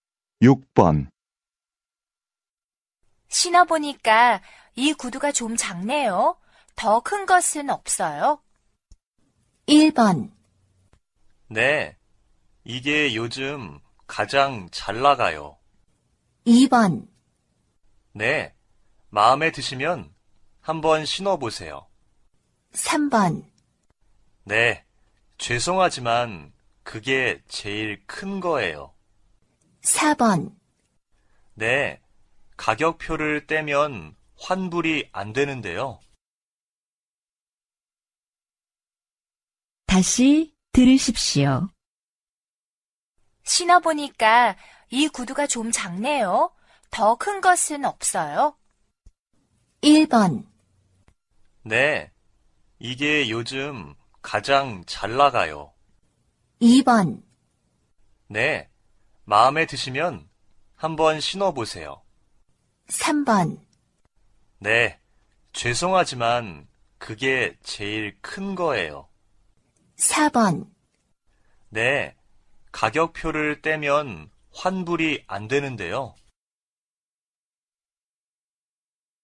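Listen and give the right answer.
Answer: 3: 네, 죄송하지만 그게 제일 큰 거예요.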